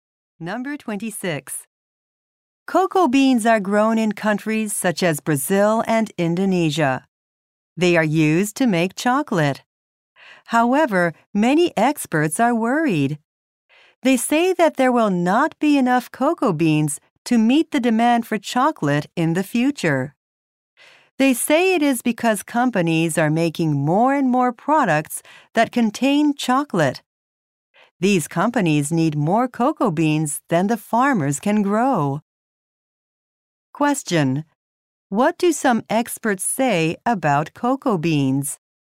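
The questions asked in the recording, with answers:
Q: What do some experts say about cocoa beans?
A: There will not be enough to meet future demand for chocolate.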